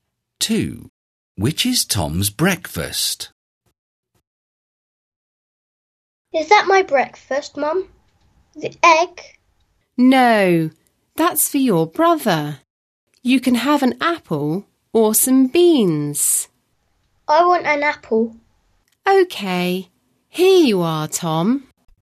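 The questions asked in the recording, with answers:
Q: Which is Tom's breakfast?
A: An apple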